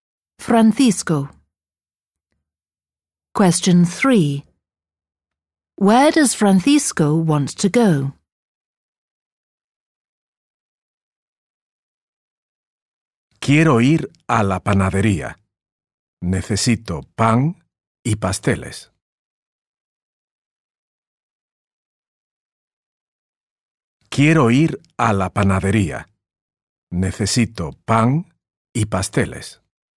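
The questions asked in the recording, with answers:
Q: Where does Francisco want to go?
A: The bakery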